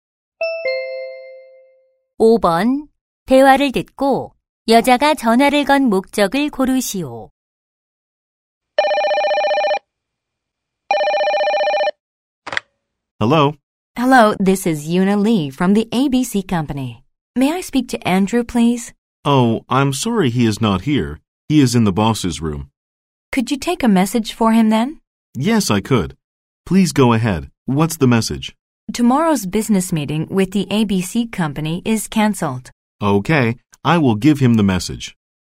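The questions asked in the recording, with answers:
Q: 대화를 듣고 여자가 전화를 건 목적을 고르시오.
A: 내일 회의 취소를 메시지로 전하려고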